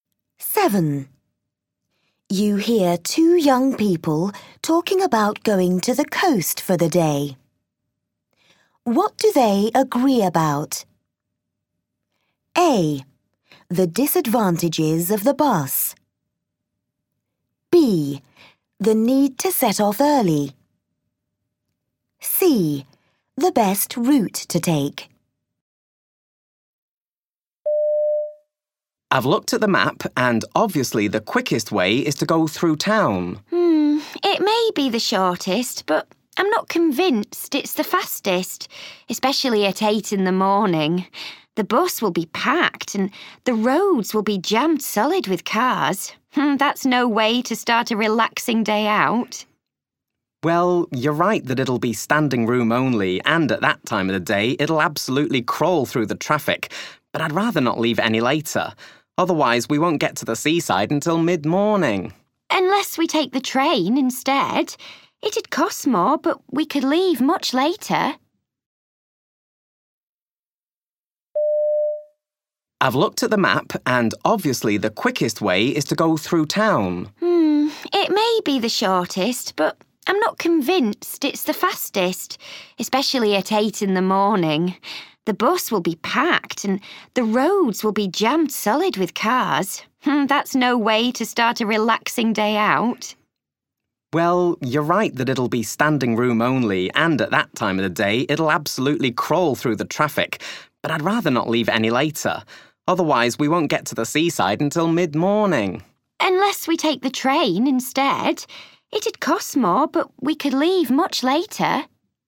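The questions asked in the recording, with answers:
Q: What do they agree about?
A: A: The disadvantages of the bus.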